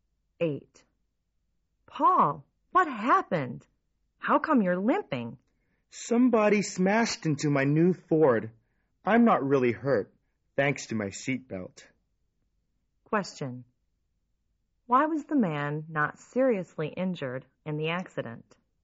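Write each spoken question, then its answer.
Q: Why was the man not seriously injured in the accident?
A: He was wearing his seatbelt.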